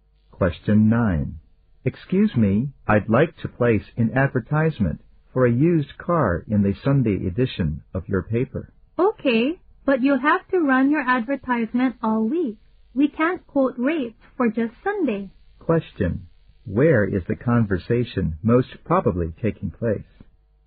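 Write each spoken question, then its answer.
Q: Where is the conversation most probably taking place?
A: At a newspaper office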